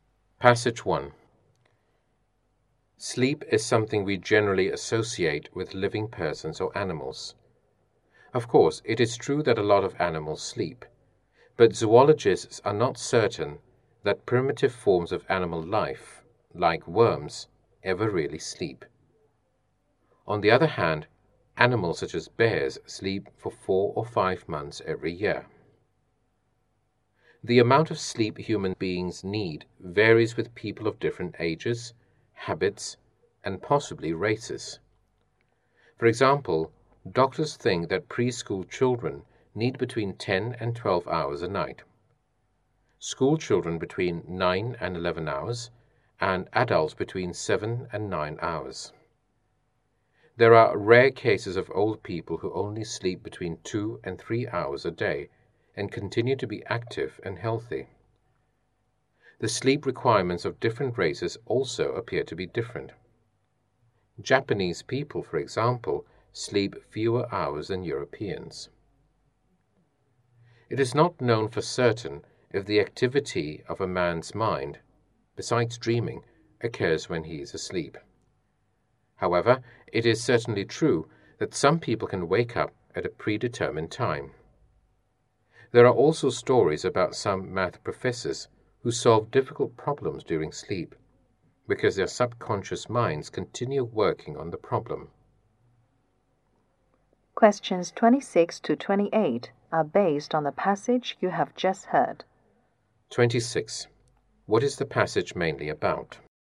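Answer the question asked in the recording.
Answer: Sleep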